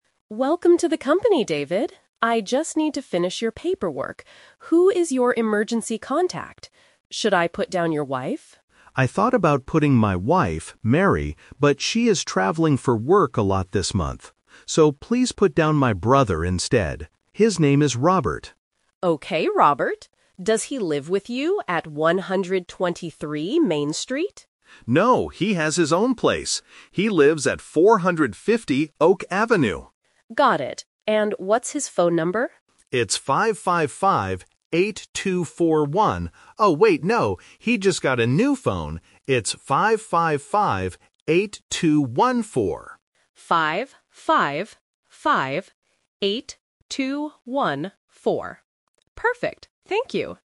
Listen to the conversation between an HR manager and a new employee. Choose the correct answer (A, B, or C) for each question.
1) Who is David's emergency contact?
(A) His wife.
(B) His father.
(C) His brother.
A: (C) His brother.

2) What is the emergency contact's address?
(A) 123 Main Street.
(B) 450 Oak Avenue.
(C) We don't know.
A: (B) 450 Oak Avenue.

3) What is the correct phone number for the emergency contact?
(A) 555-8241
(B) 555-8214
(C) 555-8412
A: (B) 555-8214

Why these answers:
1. This is "The Twist". The HR manager asks if she should write down his wife. David says he thought about it, but his wife is traveling. He says, "please put down my brother instead." Option (A) is the trap. Option (B) is not mentioned.
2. The HR manager asks if Robert lives at "123 Main Street", but David says "No... He lives at 450 Oak Avenue." Option (A) is a trap because it is David's address, not his brother's.
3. This uses the "Self-correction" technique. David first says "555-8241" but then quickly corrects himself: "Oh, wait, no... It's 555-8214." Option (A) is the trap because it is the old number. Option (C) is a plausible distractor that sounds similar.

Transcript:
HR Manager: Welcome to the company, David. I just need to finish your paperwork. Who is your emergency contact? Should I put down your wife?
David: I thought about putting my wife, Mary, but she is traveling for work a lot this month. So, please put down my brother instead. His name is Robert.
HR Manager: Okay, Robert. Does he live with you at 123 Main Street?
David: No, he has his own place. He lives at 450 Oak Avenue.
HR Manager: Got it. And what's his phone number?
David: It's 555-8241. Oh, wait, no. He just got a new phone. It's 555-8214.
HR Manager: 555-8214. Perfect. Thank you!

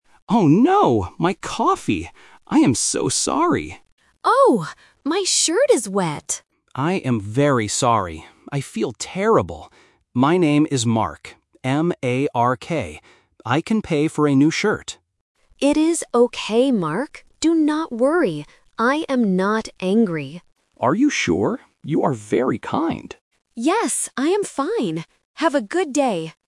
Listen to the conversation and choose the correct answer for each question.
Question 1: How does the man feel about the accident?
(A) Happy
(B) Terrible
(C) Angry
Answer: (B) Terrible

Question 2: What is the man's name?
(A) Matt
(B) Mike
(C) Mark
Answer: (C) Mark

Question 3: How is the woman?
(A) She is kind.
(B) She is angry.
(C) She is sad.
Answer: (A) She is kind.

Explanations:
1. The correct answer is (B). The man apologizes and explicitly says, "I feel terrible." Options (A) "Happy" and (C) "Angry" do not fit the man's reaction, and "angry" is used later to describe the woman's lack of anger.
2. The correct answer is (C). The man spells his name very clearly: "M-A-R-K." Options (A) "Matt" and (B) "Mike" are sound traps because they are common names starting with "M".
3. The correct answer is (A). The man says to her, "You are very kind," after she forgives him. Option (B) "She is angry" is the trap; she explicitly states, "I am not angry." Option (C) "She is sad" is never mentioned in the audio.

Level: A1

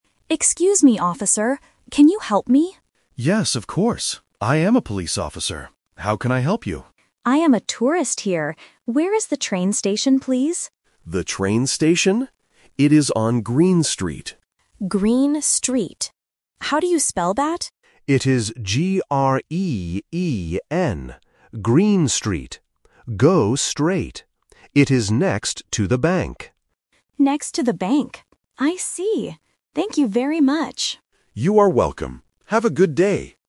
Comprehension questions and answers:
Listen to the conversation between a tourist and a police officer. Choose the correct answer (A, B, or C) for each question.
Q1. What is the man's job?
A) A bank worker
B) A tourist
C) A police officer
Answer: C) A police officer

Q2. Where does the woman want to go?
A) To the train station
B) To the police station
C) To the bank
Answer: A) To the train station

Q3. How do you spell the name of the street?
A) G-R-E-A-N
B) G-R-E-E-N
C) G-R-E-N-N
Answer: B) G-R-E-E-N

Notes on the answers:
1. The man clearly says: "I am a police officer." Option (A) is a trap because "bank" is mentioned later in the audio. Option (B) is the woman's role (the tourist), not the man's job.
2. The woman asks: "Where is the train station, please?". Option (C) is a trap because the bank is just near the station ("next to the bank"). Option (B) is related to the man's job but is not the place she wants to go.
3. The police officer spells the street name very clearly: "G-R-E-E-N". Options (A) and (C) are distractors with incorrect vowels or consonants.

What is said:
Tourist: Excuse me, officer. Can you help me?
Police Officer: Yes, of course. I am a police officer. How can I help you?
Tourist: I am a tourist here. Where is the train station, please?
Police Officer: The train station? It is on Green Street.
Tourist: Green Street. How do you spell that?
Police Officer: It is G-R-E-E-N. Green Street. Go straight. It is next to the bank.
Tourist: Next to the bank. I see. Thank you very much!

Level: A1

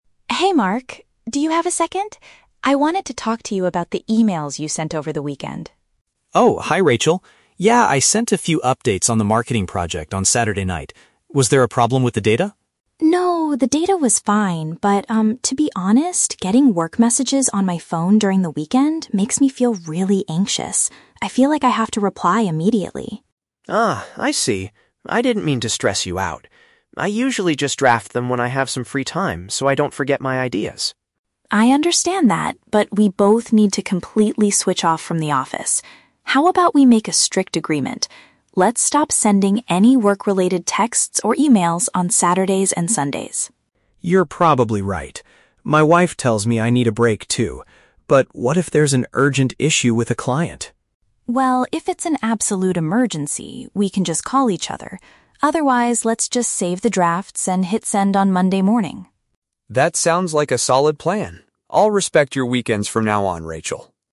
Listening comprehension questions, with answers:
Listen to the conversation between two colleagues and choose the correct answer (A, B, or C).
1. Why does Rachel want to talk to Mark?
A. She found a serious mistake in the marketing project data.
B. She feels stressed when receiving his messages on her days off.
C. She needs his help to finish a presentation by Monday morning.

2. What is Mark's reason for writing emails on the weekend?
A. He tries to finish his work before going out on Saturday night.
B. He is forced to work extra hours by the company's management.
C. He wants to record his thoughts before they slip his mind.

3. What exception do they agree on for contacting each other on weekends?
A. They will only call if there is a highly critical situation.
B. They will text if one of them forgets to save a draft.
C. They will email if a client wants to schedule a meeting.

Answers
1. B. She feels stressed when receiving his messages on her days off.
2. C. He wants to record his thoughts before they slip his mind.
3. A. They will only call if there is a highly critical situation.

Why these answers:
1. Rachel says that getting work messages during the weekend makes her "feel really anxious," which means she feels stressed.
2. Mark explains that he drafts emails so he doesn't "forget my ideas." "Record his thoughts before they slip his mind" is a paraphrase of this reason.
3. Rachel suggests that if it's an "absolute emergency" (a highly critical situation), they can "call each other."

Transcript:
Rachel: Hey, Mark. Do you have a second? I wanted to talk to you about the emails you sent over the weekend.
Mark: Oh, hi Rachel. Yeah, I sent a few updates on the marketing project on Saturday night. Was there a problem with the data?
Rachel: No, the data was fine. But, um, to be honest, getting work messages on my phone during the weekend makes me feel really anxious. I feel like I have to reply immediately.
Mark: Ah, I see. I didn't mean to stress you out. I usually just draft them when I have some free time so I don't forget my ideas.
Rachel: I understand that, but we both need to completely switch off from the office. How about we make a strict agreement? Let's stop sending any work-related texts or emails on Saturdays and Sundays.
Mark: You're probably right. My wife tells me I need a break, too. But what if there's an urgent issue with a client?
Rachel: Well, if it's an absolute emergency, we can just call each other. Otherwise, let's just save the drafts and hit send on Monday morning.

